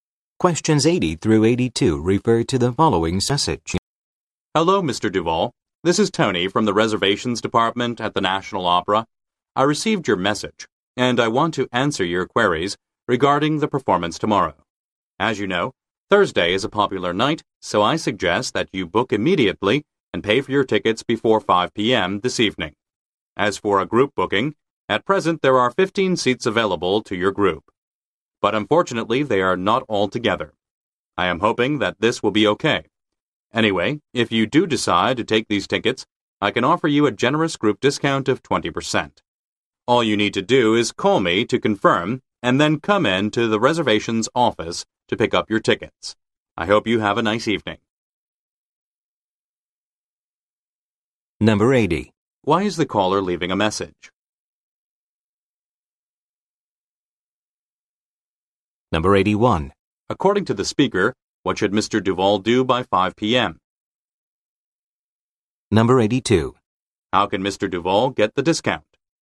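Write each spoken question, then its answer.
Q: Why is the caller leaving a message?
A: To answer his questions about tomorrow's performance

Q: According to the speaker, what should Mr. Duval do by 5 p.m.?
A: Book and pay for the tickets

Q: How can Mr. Duval get the discount?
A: By taking the 15 seats for his group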